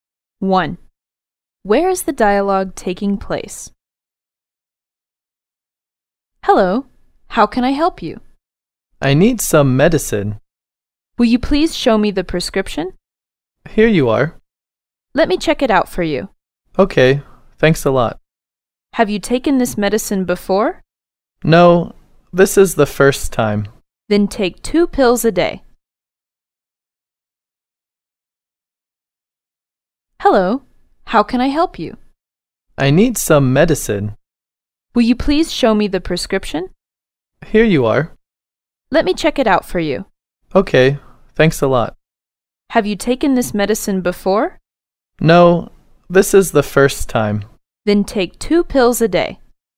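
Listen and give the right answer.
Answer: At a pharmacy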